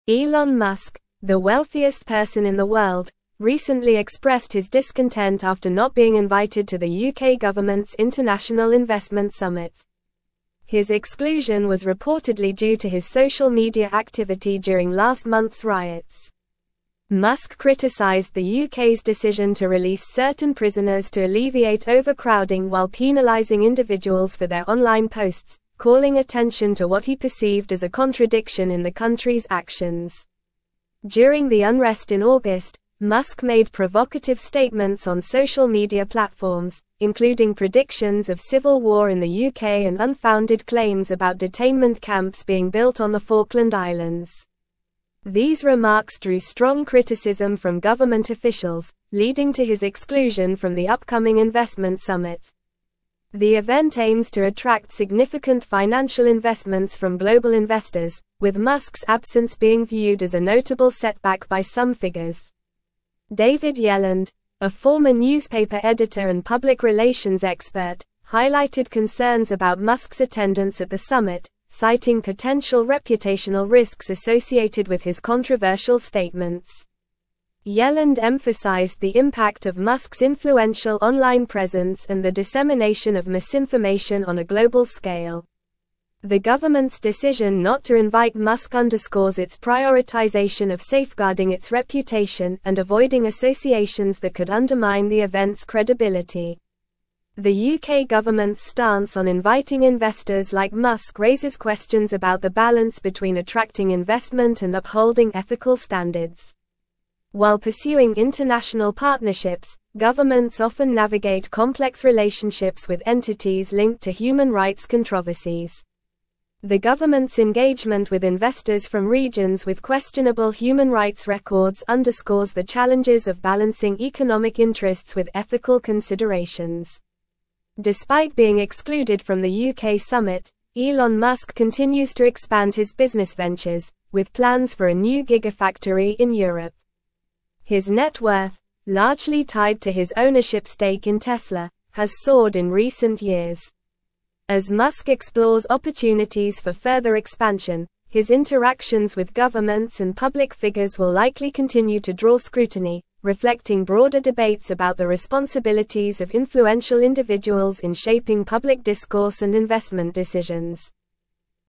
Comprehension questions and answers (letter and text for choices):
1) Why was Elon Musk not invited to the UK government's International Investment Summit?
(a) His lack of interest in attending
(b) His busy schedule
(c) His social media activity during last month's riots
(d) His nationality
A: (c) His social media activity during last month's riots

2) What did Elon Musk criticize the UK government for?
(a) Releasing prisoners to alleviate overcrowding while penalizing individuals for their online posts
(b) Not investing enough in technology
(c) Ignoring international investors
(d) Allowing too many people to attend the summit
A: (a) Releasing prisoners to alleviate overcrowding while penalizing individuals for their online posts

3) What did Musk predict about the UK during the unrest in August?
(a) Economic boom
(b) Peace and prosperity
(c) Technological advancements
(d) Civil war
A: (d) Civil war

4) What unfounded claims did Musk make during the unrest?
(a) A new airport being constructed in London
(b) Detainment camps being built on the Falkland Islands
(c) A space mission to Mars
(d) A new Tesla factory in Antarctica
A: (b) Detainment camps being built on the Falkland Islands

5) Who highlighted concerns about Musk's attendance at the summit?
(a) Elon Musk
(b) The UK Prime Minister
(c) A random citizen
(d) David Yelland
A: (d) David Yelland

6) What was one of the reasons cited for the UK government's decision not to invite Musk?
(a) Potential reputational risks associated with his controversial statements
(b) Lack of interest from Musk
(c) Lack of space at the summit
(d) Fear of his financial dominance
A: (a) Potential reputational risks associated with his controversial statements

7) What does the article suggest about the challenges governments face in attracting investment?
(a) Ignoring ethical standards for financial gain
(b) Balancing economic interests with ethical considerations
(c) Prioritizing financial investments over human rights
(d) Avoiding controversial figures at all costs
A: (b) Balancing economic interests with ethical considerations

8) Despite being excluded from the UK summit, what are Elon Musk's future plans?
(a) Retiring from business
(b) Focusing on social media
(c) Building a new gigafactory in Europe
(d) Investing in the stock market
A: (c) Building a new gigafactory in Europe

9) Elon Musk, the wealthiest person in the (1)______, recently expressed his discontent after not being invited to the UK government's International Investment Summit.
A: world

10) His exclusion was reportedly due to his social media (2)______ during last month's riots.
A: activity

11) During the unrest in (3)______, Musk made (4)______ statements on social media platforms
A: August

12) During the unrest in (3)______, Musk made (4)______ statements on social media platforms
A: provocative

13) unfounded claims about detainment camps being (5)______ on the Falkland Islands.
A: built

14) These remarks drew strong criticism from government officials, leading to his exclusion from the upcoming investment (6)______.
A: summit

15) The event aims to attract (7)______ financial (8)______ from global investors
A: significant

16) The event aims to attract (7)______ financial (8)______ from global investors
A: investments

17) The government's decision not to invite Musk underscores its prioritization of (9)______ its reputation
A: safeguarding

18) avoiding associations that could undermine the event's (10)______.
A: credibility

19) The UK government's stance on inviting (11)______ like Musk raises questions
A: investors

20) governments often navigate complex relationships with entities (12)______ to human rights controversies.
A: linked

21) underscores the (13)______ of balancing economic interests with (14)______ considerations.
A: challenges

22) underscores the (13)______ of balancing economic interests with (14)______ considerations.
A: ethical

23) with plans for a new (15)______ in Europe.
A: gigafactory

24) As Musk explores opportunities for (16)______ expansion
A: further

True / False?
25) The government's decision to invite Musk raises questions about the effectiveness of attracting investment while maintaining ethical standards.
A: False

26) David Yelland, a former newspaper editor, commended Musk's attendance at the summit due to the potential benefits associated with his controversial statements.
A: False

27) Elon Musk's net worth is mostly tied to his ownership stake in Tesla, which has seen a decline in recent years.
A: False

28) Elon Musk praised the UK government for extending an invitation to him for the International Investment Summit despite his social media activity during last month's riots.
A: False

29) Musk made provocative statements on social media during the August unrest, including predictions of civil war in the UK and claims about detainment camps on the Falkland Islands.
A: True

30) Musk's interactions with governments and public figures will likely continue to draw scrutiny as he expands his business ventures, reflecting broader debates about the responsibilities of influential individuals.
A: True

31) Government officials criticized Musk's remarks, leading to his exclusion from the investment summit.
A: True

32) The UK government prioritized safeguarding its reputation by not inviting Musk to the investment summit.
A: True

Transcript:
Elon Musk, the wealthiest person in the world, recently expressed his discontent after not being invited to the UK government's International Investment Summit. His exclusion was reportedly due to his social media activity during last month's riots. Musk criticized the UK's decision to release certain prisoners to alleviate overcrowding while penalizing individuals for their online posts, calling attention to what he perceived as a contradiction in the country's actions.
During the unrest in August, Musk made provocative statements on social media platforms, including predictions of civil war in the UK and unfounded claims about detainment camps being built on the Falkland Islands. These remarks drew strong criticism from government officials, leading to his exclusion from the upcoming investment summit. The event aims to attract significant financial investments from global investors, with Musk's absence being viewed as a notable setback by some figures.
David Yelland, a former newspaper editor and public relations expert, highlighted concerns about Musk's attendance at the summit, citing potential reputational risks associated with his controversial statements. Yelland emphasized the impact of Musk's influential online presence and the dissemination of misinformation on a global scale. The government's decision not to invite Musk underscores its prioritization of safeguarding its reputation and avoiding associations that could undermine the event's credibility.
The UK government's stance on inviting investors like Musk raises questions about the balance between attracting investment and upholding ethical standards. While pursuing international partnerships, governments often navigate complex relationships with entities linked to human rights controversies. The government's engagement with investors from regions with questionable human rights records underscores the challenges of balancing economic interests with ethical considerations.
Despite being excluded from the UK summit, Elon Musk continues to expand his business ventures, with plans for a new gigafactory in Europe. His net worth, largely tied to his ownership stake in Tesla, has soared in recent years. As Musk explores opportunities for further expansion, his interactions with governments and public figures will likely continue to draw scrutiny, reflecting broader debates about the responsibilities of influential individuals in shaping public discourse and investment decisions.

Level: Level 4